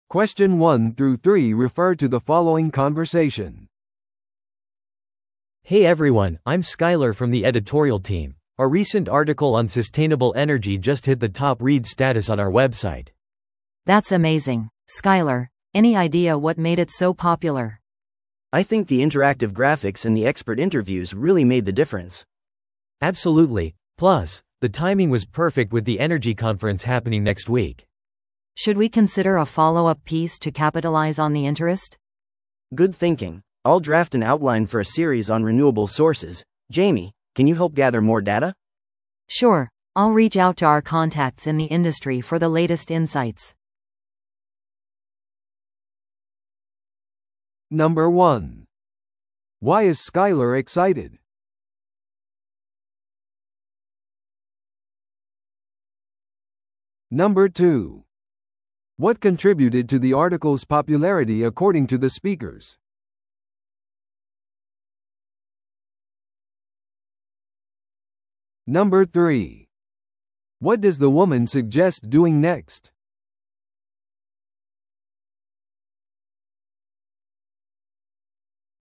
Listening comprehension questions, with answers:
Listen to the audio below and answer the questions.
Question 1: Why is Skyler excited?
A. エネルギー会議のプレゼンテーションが準備できたから。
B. ウェブサイトに掲載された記事が注目を集めたから。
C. 編集チームが賞を受賞したから。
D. 有名なニュースアウトレットに雇われたから。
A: ウェブサイトに掲載された記事が注目を集めたから。

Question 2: What contributed to the article's popularity according to the speakers?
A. 有名人の推薦が特集されたから。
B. ウェブサイトがSEOランキングを改善したから。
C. インタラクティブなコンテンツと専門家の意見が含まれていたから。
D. 記事をソーシャルメディアで広告したから。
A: インタラクティブなコンテンツと専門家の意見が含まれていたから。

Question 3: What does the woman suggest doing next?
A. 会社のイベントを計画する。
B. ニュースレターを発行する。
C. 関連する追加記事を書く。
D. ウェブサイトのデザインを更新する。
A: 関連する追加記事を書く。

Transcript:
A: Hey everyone, I'm Skyler from the editorial team. Our recent article on sustainable energy just hit the top-read status on our website!
B: That's amazing, Skyler! Any idea what made it so popular?
C: I think the interactive graphics and the expert interviews really made the difference.
A: Absolutely! Plus, the timing was perfect with the energy conference happening next week.
B: Should we consider a follow-up piece to capitalize on the interest?
C: Good thinking! I'll draft an outline for a series on renewable sources. Jamie, can you help gather more data?
B: Sure, I'll reach out to our contacts in the industry for the latest insights.

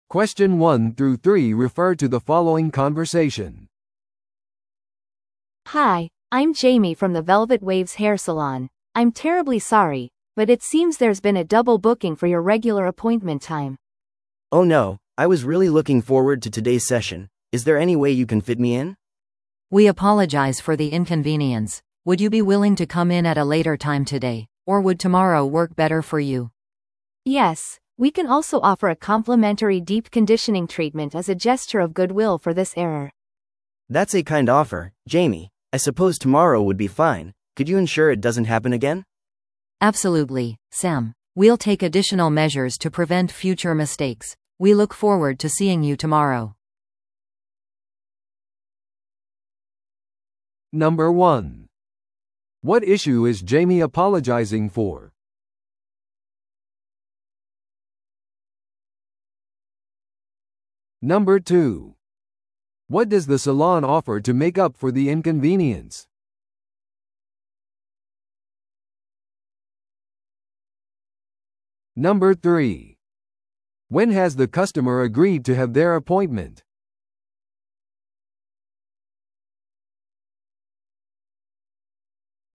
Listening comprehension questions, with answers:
Listen to the audio below and answer the questions.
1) What issue is Jamie apologizing for?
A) ミスされたヘアトリートメントセッション。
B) 遅れている散髪サービス。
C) お客様の予約日の取り違え。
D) サロンの請求での過剰請求。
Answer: お客様の予約日の取り違え。

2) What does the salon offer to make up for the inconvenience?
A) サービスに対する全額返金。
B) 次回の訪問での無料の散髪。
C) メンバーシップの延長。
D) 無料の深部コンディショニングトリートメント。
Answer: 無料の深部コンディショニングトリートメント。

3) When has the customer agreed to have their appointment?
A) 今日の後で。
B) 明日。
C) 来週。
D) 予約をキャンセルすることにした。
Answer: 明日。

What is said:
A: Hi, I'm Jamie from the Velvet Waves Hair Salon. I'm terribly sorry, but it seems there's been a double booking for your regular appointment time.
B: Oh no, I was really looking forward to today's session. Is there any way you can fit me in?
C: We apologize for the inconvenience. Would you be willing to come in at a later time today, or would tomorrow work better for you?
A: Yes, we can also offer a complimentary deep conditioning treatment as a gesture of goodwill for this error.
B: That's a kind offer, Jamie. I suppose tomorrow would be fine. Could you ensure it doesn't happen again?
C: Absolutely, Sam. We'll take additional measures to prevent future mistakes. We look forward to seeing you tomorrow.

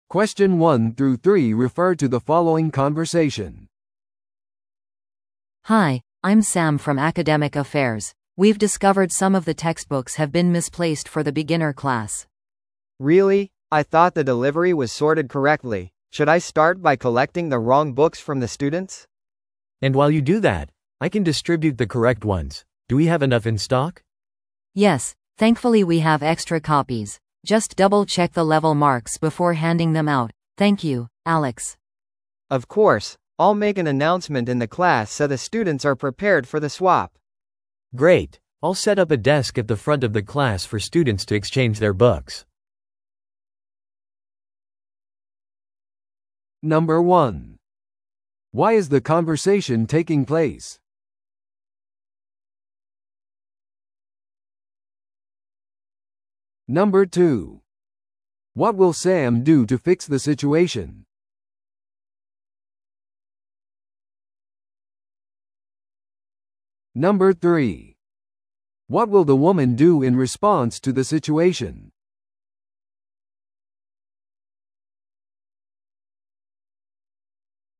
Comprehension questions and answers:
Listen to the audio below and answer the questions.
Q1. Why is the conversation taking place?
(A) 教科書の新規出荷の手配をするため。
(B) 教科書配布の間違いを正すため。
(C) アカデミックアフェアーズスタッフの会議をスケジュールするため。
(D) 初心者クラスのカリキュラムを更新するため。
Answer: 教科書配布の間違いを正すため。

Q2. What will Sam do to fix the situation?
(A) 在庫のためにさらなる教科書を注文する。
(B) 適切な分類について配送チームに教育を行う。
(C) 教科書交換のための机の設置を手伝う。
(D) 適切な教科書が配られることを確認する。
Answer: 適切な教科書が配られることを確認する。

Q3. What will the woman do in response to the situation?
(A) 生徒に正しい版の教科書を購入するように頼む。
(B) 生徒から不正確な教科書を回収する。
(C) 余分な教科書のコピーについてスタッフに情報を提供する。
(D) 入手可能な材料で初心者クラスを教える。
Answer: 生徒から不正確な教科書を回収する。

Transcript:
A: Hi, I'm Sam from Academic Affairs. We've discovered some of the textbooks have been misplaced for the beginner class.
B: Really? I thought the delivery was sorted correctly. Should I start by collecting the wrong books from the students?
C: And while you do that, I can distribute the correct ones. Do we have enough in stock?
A: Yes, thankfully we have extra copies. Just double-check the level marks before handing them out. Thank you, Alex.
B: Of course. I'll make an announcement in the class so the students are prepared for the swap.
C: Great. I'll set up a desk at the front of the class for students to exchange their books.

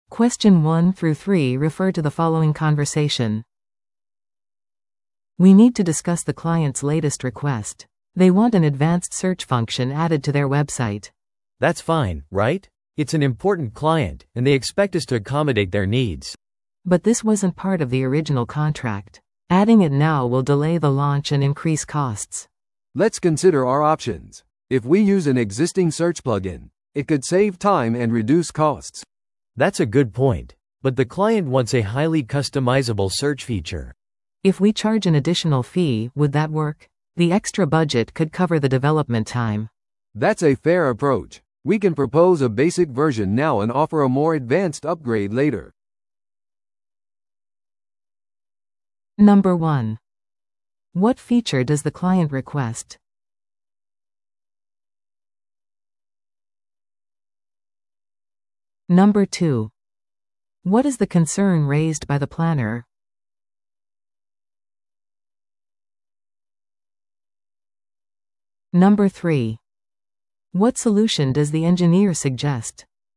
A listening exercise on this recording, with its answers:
Listen to the audio below and answer the questions.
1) What feature does the client request?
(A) 新しい決済システム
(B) 高度な検索機能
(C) モバイル対応デザイン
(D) カスタマーレビューセクション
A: 高度な検索機能

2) What is the concern raised by the planner?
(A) プロジェクトの締め切りが遅れる可能性がある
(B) 検索機能は不要である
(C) クライアントとのやりとりが難しい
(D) エンジニアチームが忙しすぎる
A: プロジェクトの締め切りが遅れる可能性がある

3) What solution does the engineer suggest?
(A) 既存の検索プラグインを利用する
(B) 追加機能をキャンセルする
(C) プロジェクトの公開を遅らせる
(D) 割引を提供する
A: 既存の検索プラグインを利用する

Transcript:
B: "We need to discuss the client's latest request. They want an advanced search function added to their website."
C: "That's fine, right? It's an important client, and they expect us to accommodate their needs."
B: "But this wasn't part of the original contract. Adding it now will delay the launch and increase costs."
A: "Let's consider our options. If we use an existing search plugin, it could save time and reduce costs."
C: "That's a good point. But the client wants a highly customizable search feature."
B: "If we charge an additional fee, would that work? The extra budget could cover the development time."
A: "That's a fair approach. We can propose a basic version now and offer a more advanced upgrade later."

